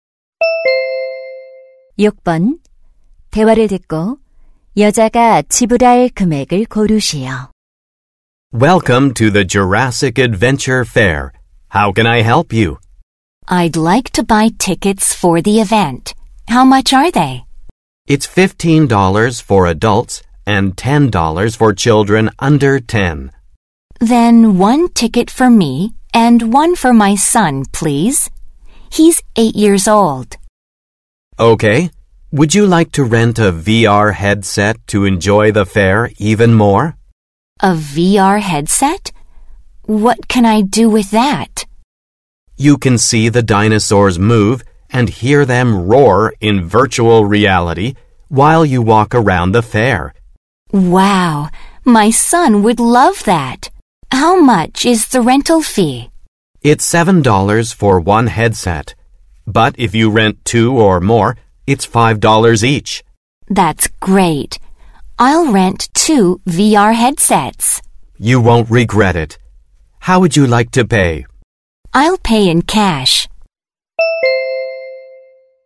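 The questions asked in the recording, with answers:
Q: 대화를 듣고 여자가 지불할 금액을 고르시오.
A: $35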